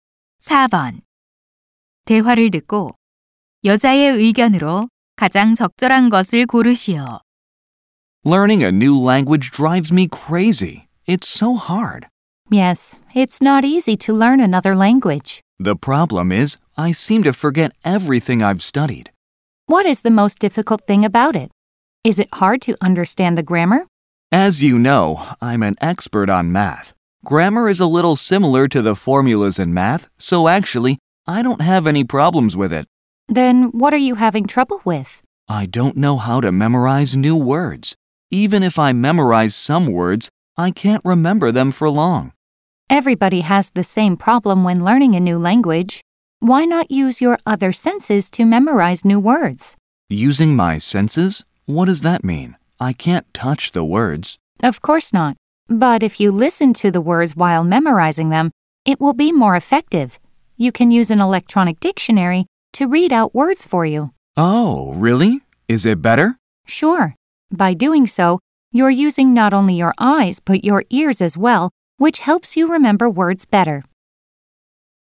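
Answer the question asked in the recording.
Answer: 단어를 외울 때 소리 내어 들으면서 여러 감각을 활용하는 것이 효과적이다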